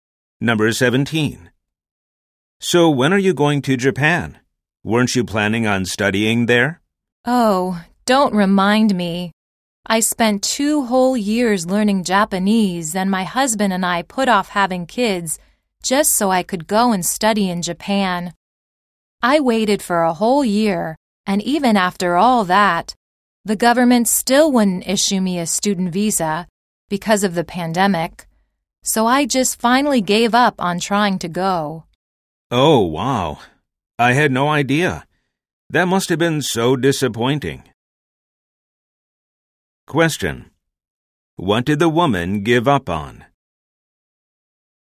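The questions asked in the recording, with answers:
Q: What did the woman give up on?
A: Going to study in Japan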